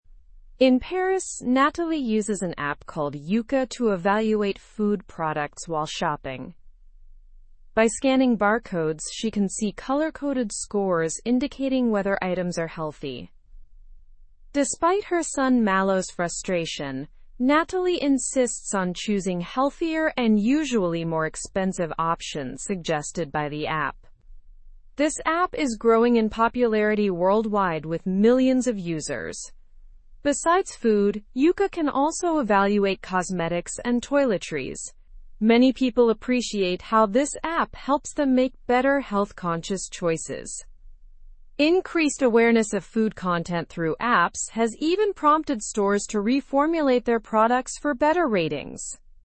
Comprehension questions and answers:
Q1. What app does Nathalie use to evaluate food products?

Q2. How does Yuka indicate the healthiness of products?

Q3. How does Malo feel about Nathalie's use of the Yuka app?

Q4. Besides food, what else can Yuka evaluate?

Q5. How has the popularity of Yuka impacted stores?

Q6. How many users does the Yuka app have worldwide?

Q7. Why do people appreciate the Yuka app?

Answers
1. Nathalie uses the Yuka app.
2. Yuka uses color-coded scores to indicate the healthiness of products.
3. Malo feels frustrated about Nathalie's use of the Yuka app.
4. Yuka can also evaluate cosmetics and toiletries.
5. The popularity of Yuka has prompted stores to reformulate their products for better ratings.
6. The Yuka app has millions of users worldwide.
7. People appreciate the Yuka app because it helps them make better health-conscious choices.

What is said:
In Paris, Nathalie uses an app called Yuka to evaluate food products while shopping. By scanning barcodes, she can see color-coded scores indicating whether items are healthy.
Despite her son Malo's frustration, Nathalie insists on choosing healthier and usually more expensive options suggested by the app. This app is growing in popularity worldwide with millions of users.
Besides food, Yuka can also evaluate cosmetics and toiletries. Many people appreciate how this app helps them make better health-conscious choices.
Increased awareness of food content through apps has even prompted stores to reformulate their products for better ratings.

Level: Level 3